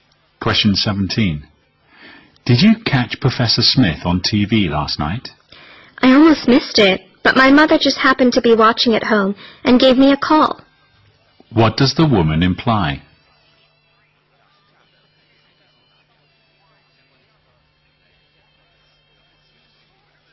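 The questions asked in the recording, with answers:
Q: What does the woman imply?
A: She nearly missed the program but her mother called her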